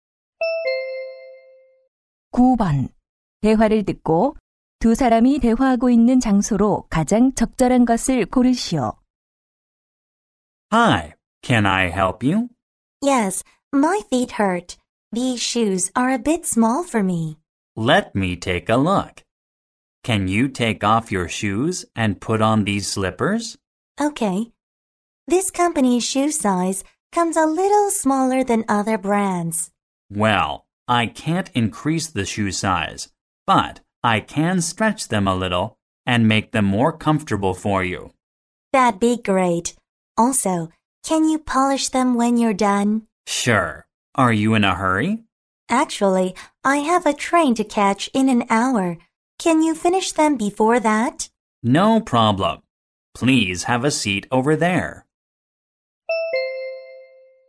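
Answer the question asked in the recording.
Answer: 구두 수선점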